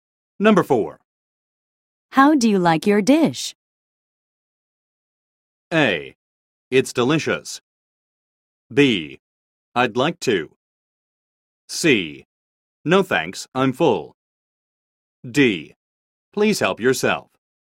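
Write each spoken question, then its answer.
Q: How do you like your dish?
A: A: It's delicious.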